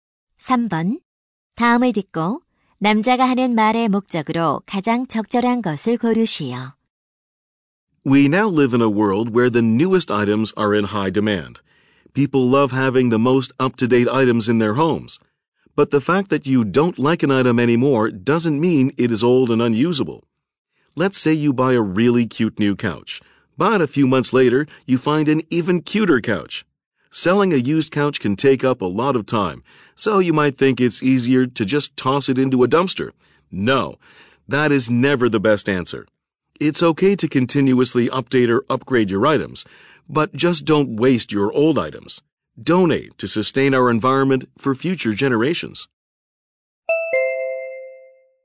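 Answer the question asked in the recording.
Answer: 더 이상 쓰지 않는 물건을 버리지 말고 기부하도록 권장하려고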